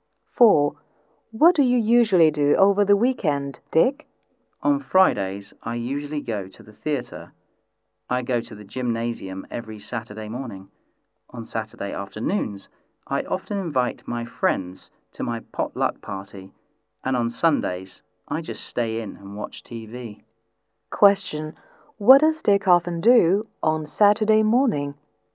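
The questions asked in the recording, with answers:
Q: What does Dick often do on Saturday morning?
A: Goes to the gymnasium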